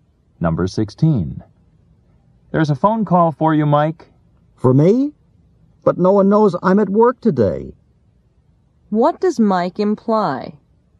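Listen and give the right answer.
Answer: He is surprised to get a call because no one knows he is at work.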